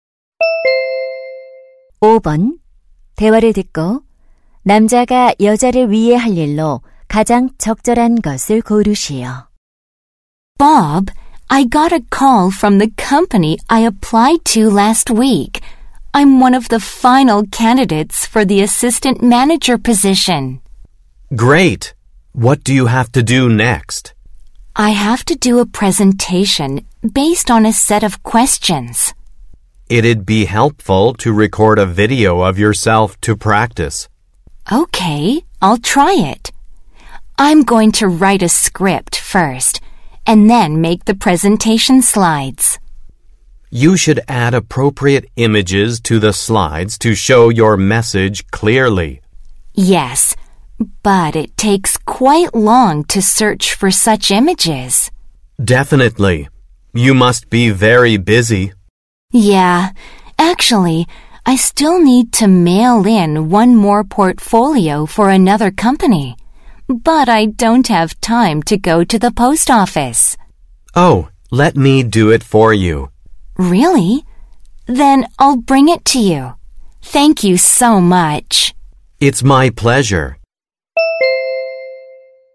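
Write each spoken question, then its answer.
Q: 대화를 듣고 남자가 여자를 위해 할 일로 가장 적절한 것을 고르시오.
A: 포트폴리오 우편 발송하기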